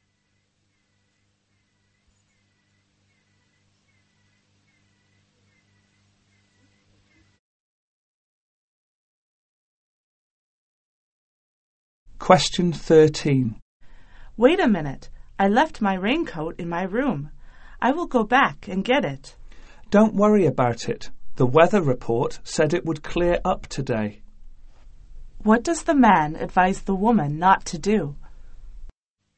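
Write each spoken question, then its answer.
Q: What does the man advise the woman not to do?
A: Go back for her raincoat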